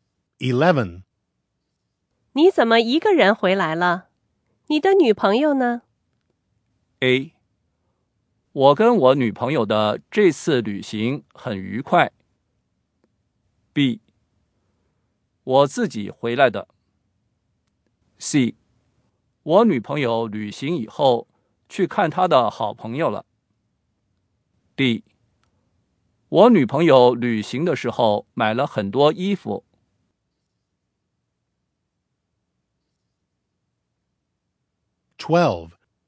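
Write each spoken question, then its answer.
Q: 你怎么一个人回来了?你的女朋友呢?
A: C: 我女朋友旅行以后去看她的好朋友了。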